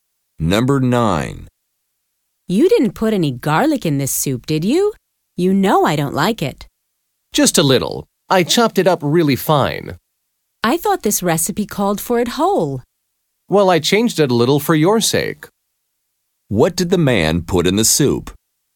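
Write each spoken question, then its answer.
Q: What did the man put in the soup?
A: Finely chopped garlic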